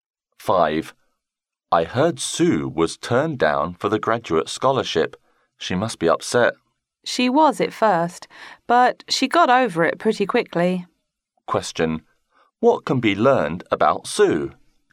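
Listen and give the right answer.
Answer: She was upset at first about being turned down for the scholarship but quickly got over it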